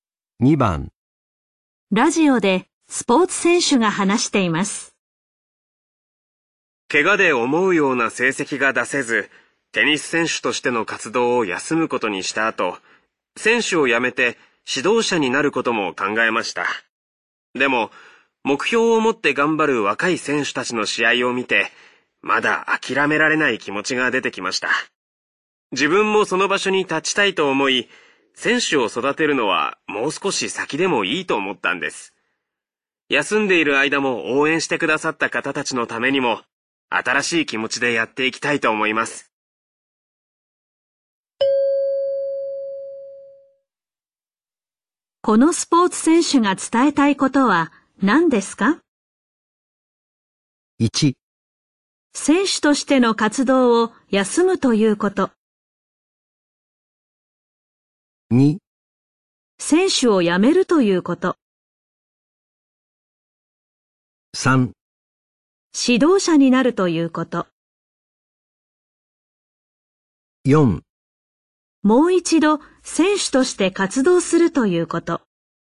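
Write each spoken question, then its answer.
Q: このスポーツ選手が伝えたいことは何ですか?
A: 4: もう一度選手として活動するということ。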